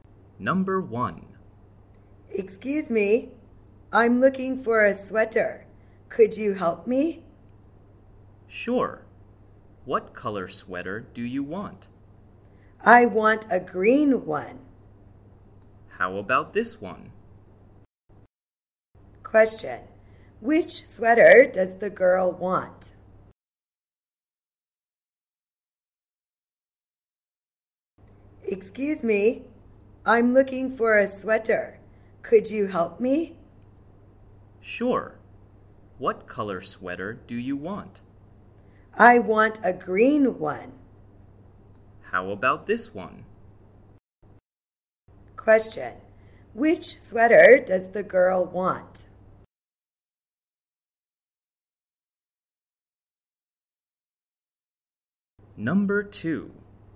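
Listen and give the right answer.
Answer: A green one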